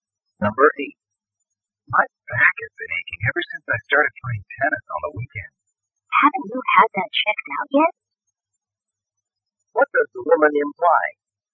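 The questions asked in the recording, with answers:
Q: What does the woman imply?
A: He should see a doctor about his back.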